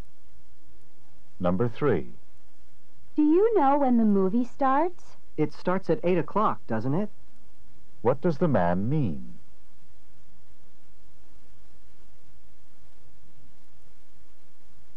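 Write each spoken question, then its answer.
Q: What does the man mean?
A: He thinks it starts at 8 but isn't sure.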